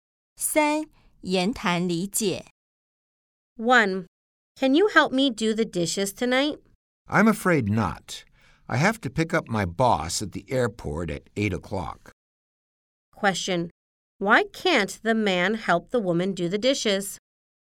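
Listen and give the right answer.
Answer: He has to pick up his boss at the airport at 8 o'clock.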